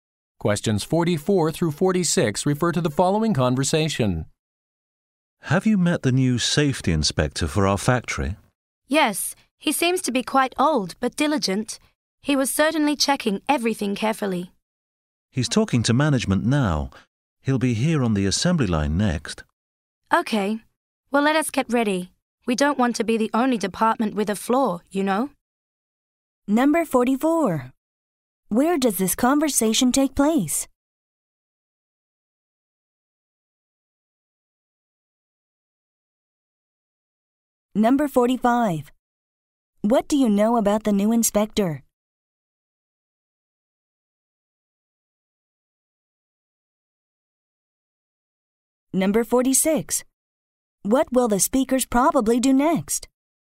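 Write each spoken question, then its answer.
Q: Where does this conversation take place?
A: In a factory, on the assembly line

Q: What do you know about the new inspector?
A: He is quite old but diligent

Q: What will the speakers probably do next?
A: Get ready for the inspection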